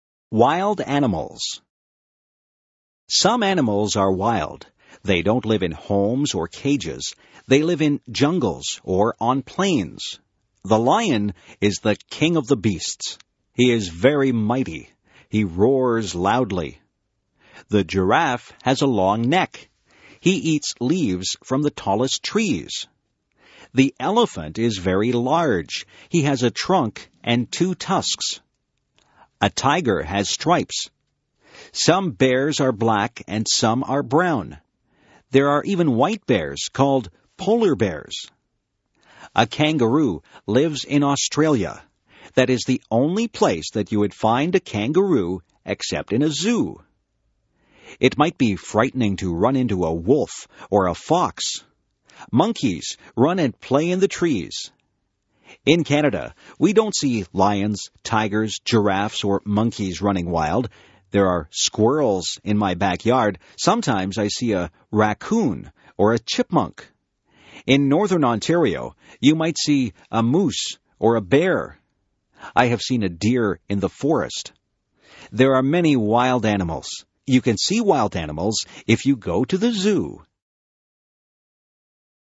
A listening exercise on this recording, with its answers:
Listen and fill in the blanks with suitable words:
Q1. The lion is the ______ of the beasts.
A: king

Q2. A tiger has ______ on its body.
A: stripes

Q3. The elephant has a ______ and two ______.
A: trunk, tusks

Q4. A ______ lives in Australia and it jumps very high.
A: kangaroo

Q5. In Canada, you might see a ______ or a bear in northern Ontario.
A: moose

True or False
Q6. Lions live on plains or in jungles.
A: True

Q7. The giraffe has a short neck.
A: False

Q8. Polar bears are white.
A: True

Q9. Kangaroos live everywhere in the world.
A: False

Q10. In Canada, you can see lions running wild.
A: False

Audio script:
Scrip: Some animals are wild. They don't live in homes or cages. They live in jungles or on plains. The lion is the king of the beasts. He is very mighty. He roasts loudly. The giraffe has a long neck. He eats leaves from the tallest trees. The elephant is very large. He has a trunk and two tusks. A tiger has stripes. Some bears are black and some are brown. There are even white bears called polar bears. A kangaroo lives in Australia. There is only place that you would find a kangaroo except in the zoo. It might be frightening to run into a wolf or a fox. monkeys run and play in the trees. In Canada we don't see lions, tigers, giraffes, or monkeys running wild. There are squirrels in my backyard. Sometimes I see a raccoon or a chipmunk. In northern Ontario, you might see a moose or a bear. I have seen a deer in the forest. There are many wild animals. You can see wild animals if you go to the zoo.